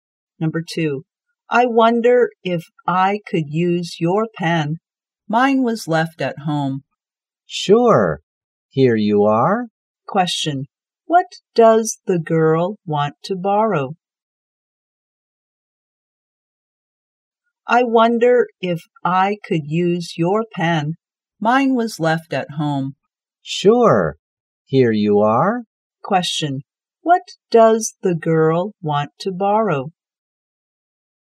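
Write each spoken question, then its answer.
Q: What does the girl want to borrow?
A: A pen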